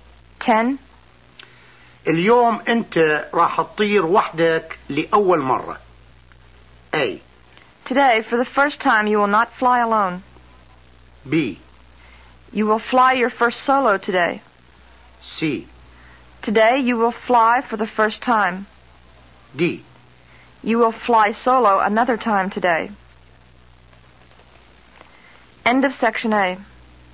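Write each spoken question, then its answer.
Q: اليوم انت راح تطير وحدك لأول مرة.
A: B: You will fly your first solo today.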